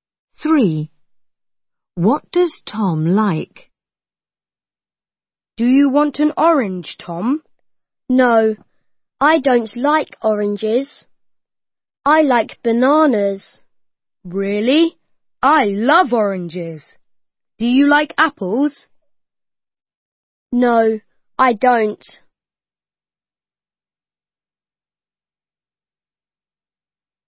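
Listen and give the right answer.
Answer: Bananas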